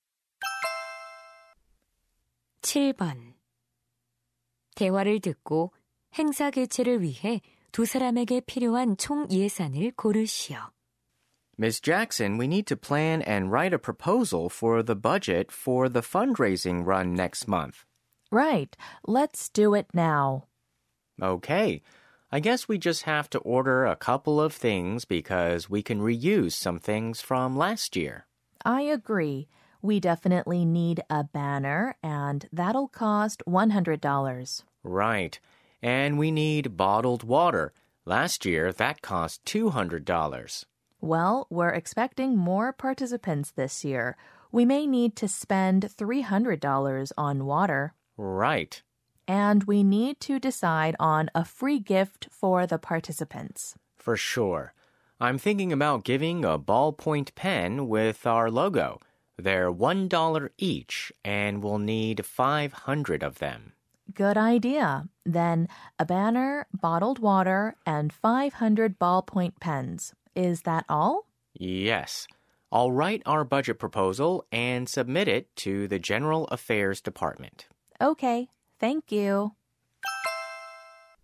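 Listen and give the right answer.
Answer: 900달러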